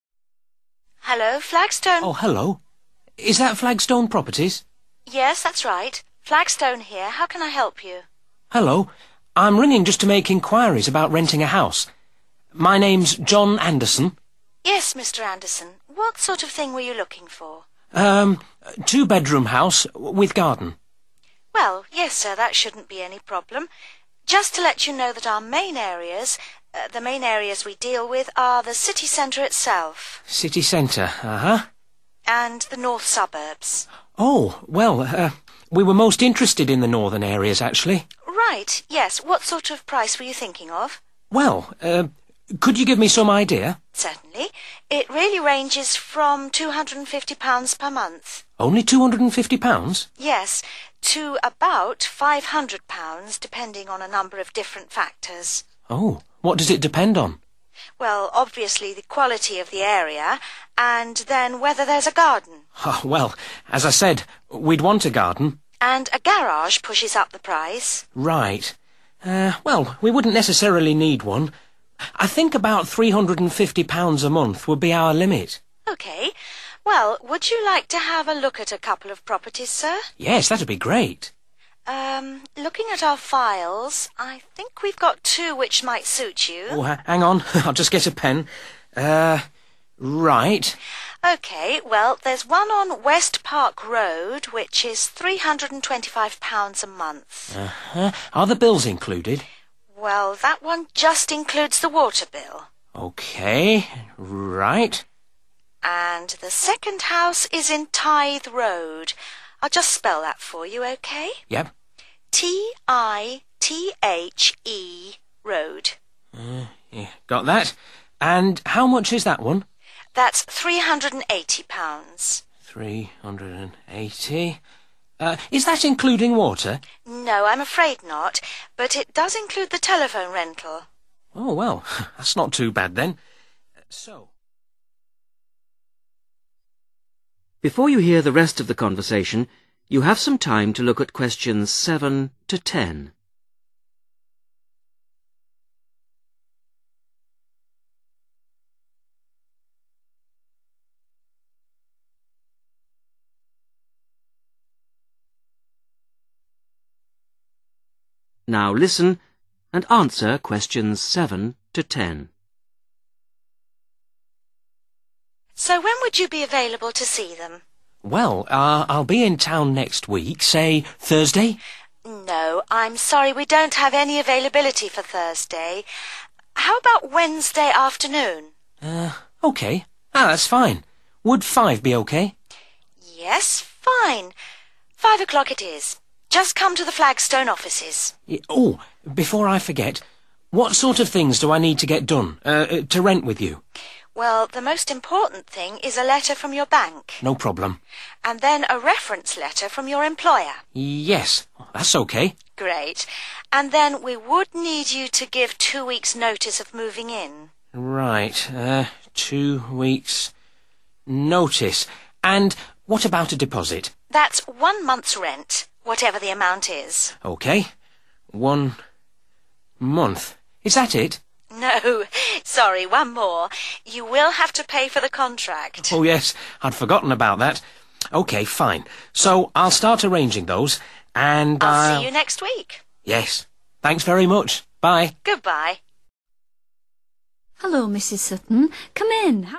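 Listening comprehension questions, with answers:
Complete the notes below.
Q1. Areas dealt with: (1) ......................... north suburbs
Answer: city centre

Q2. Rent: from (2) £......................... to £......................... a month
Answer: 250 / 500

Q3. – availability of (3) .........................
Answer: garden

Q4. – rent (4) £......................... a month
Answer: 325

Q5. – including (5) .........................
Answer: water bill

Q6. – including (6) ......................... rental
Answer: telephone

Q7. Viewing arrangements: meet at office on (7) ......................... at 5.00 pm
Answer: Wednesday

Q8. – reference from (8) .........................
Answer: employer

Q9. – give (9) ......................... notice of moving in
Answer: 2 weeks'

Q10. – give deposit of (10) .........................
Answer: 1 month's rent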